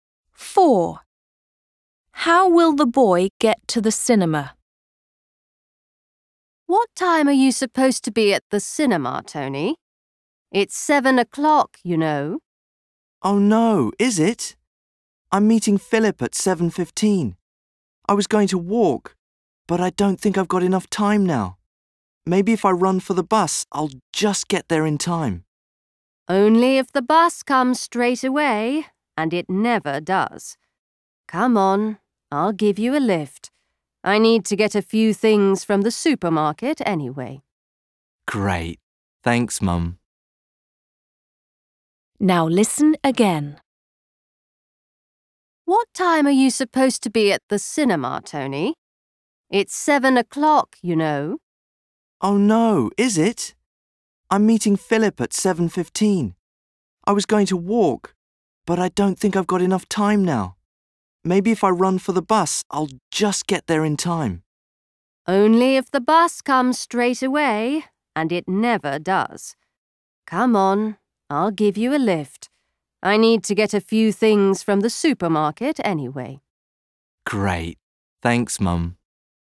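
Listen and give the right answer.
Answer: By car (his mum gives him a lift)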